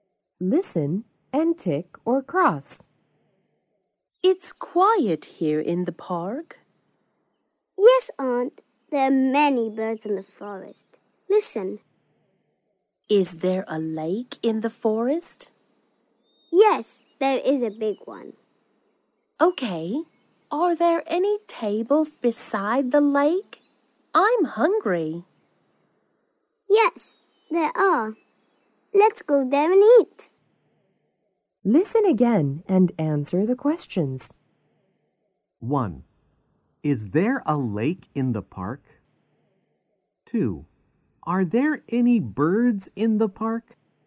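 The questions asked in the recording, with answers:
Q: Is there a lake in the park?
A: Yes, there is.

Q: Are there any birds in the park?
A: Yes, there are.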